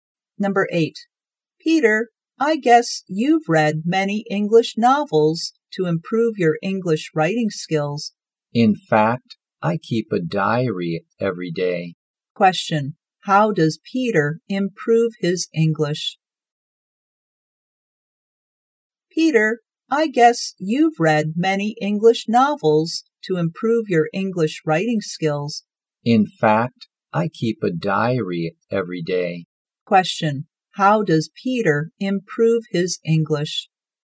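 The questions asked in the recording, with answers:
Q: How does Peter improve his English?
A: By keeping a diary every day.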